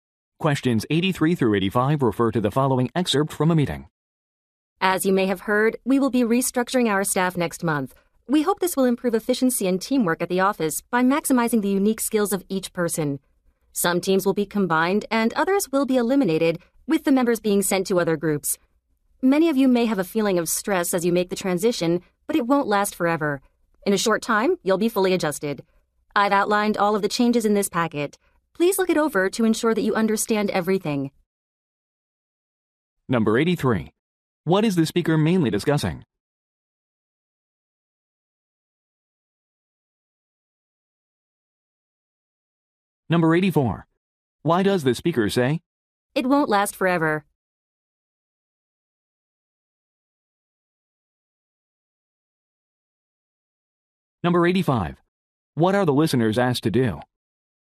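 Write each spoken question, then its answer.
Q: What is the speaker mainly discussing?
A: Staff restructuring

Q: What are the listeners asked to do?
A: Review the packet of changes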